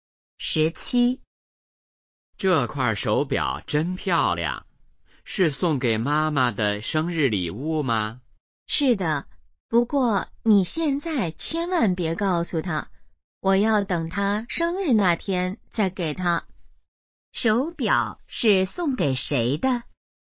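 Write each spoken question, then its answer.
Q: 手表是送给谁的?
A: 妈妈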